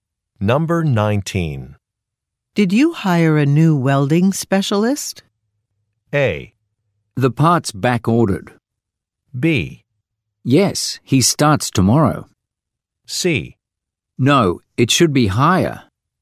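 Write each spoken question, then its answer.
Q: Did you hire a new welding specialist?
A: B: Yes, he starts tomorrow.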